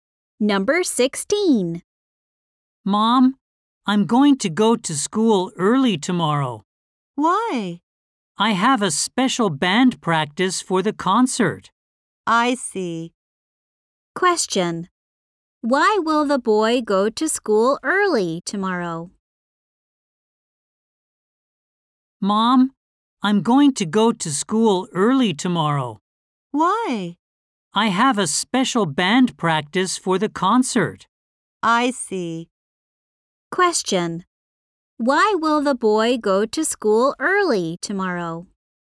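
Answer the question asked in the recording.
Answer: He has a special band practice for the concert.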